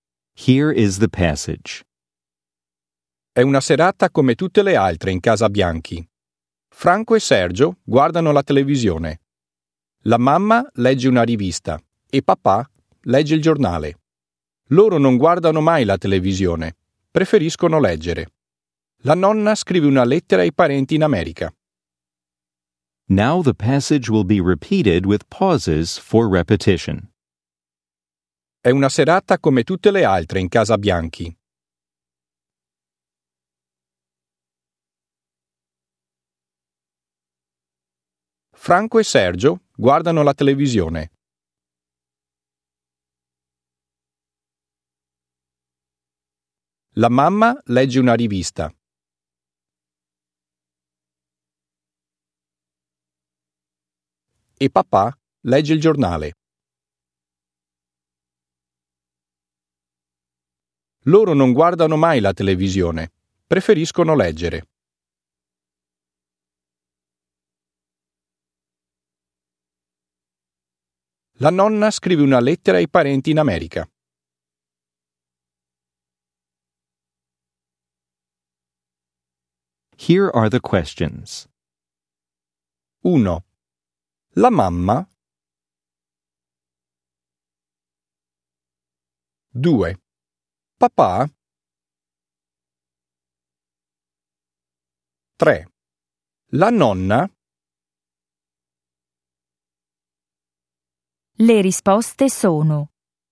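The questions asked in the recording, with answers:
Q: La mamma.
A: legge una rivista

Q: Papà.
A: legge il giornale

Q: La nonna.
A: scrive una lettera ai parenti in America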